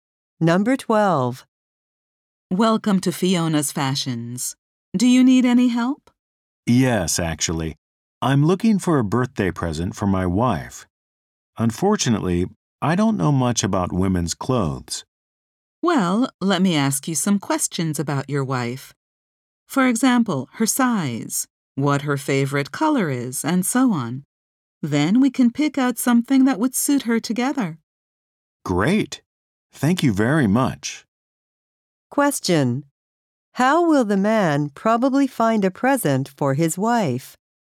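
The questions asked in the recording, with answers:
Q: How will the man probably find a present for his wife?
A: By choosing something with the salesclerk's help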